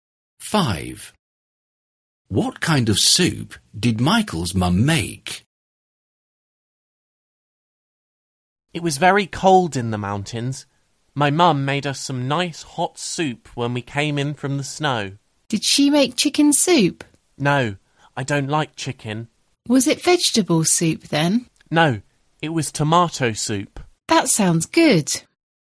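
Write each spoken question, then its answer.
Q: What kind of soup did Michael's mum make?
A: tomato soup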